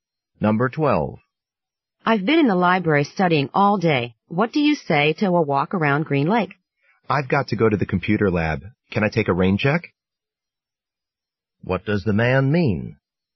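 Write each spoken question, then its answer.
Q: What does the man mean?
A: He can't go now but would like to go another time.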